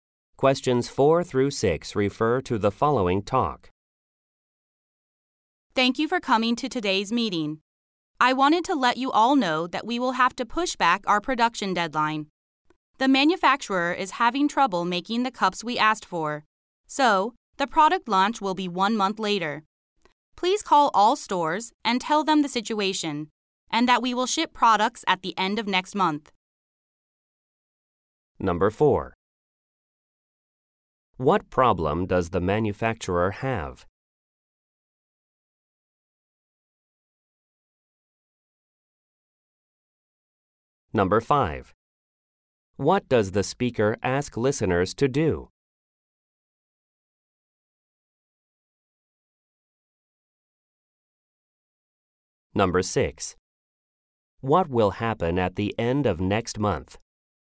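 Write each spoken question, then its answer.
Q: What problem does the manufacturer have?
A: Trouble making the cups

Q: What does the speaker ask listeners to do?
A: Call all stores

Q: What will happen at the end of next month?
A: Products will be shipped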